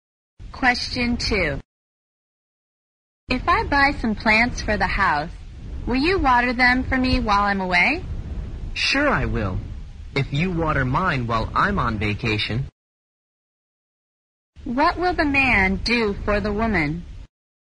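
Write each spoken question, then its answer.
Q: What will the man do for the woman?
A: Water her plants while she is away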